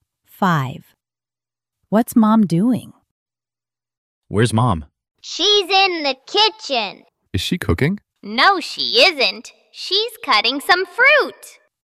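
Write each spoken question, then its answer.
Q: What's Mom doing?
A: Cutting some fruit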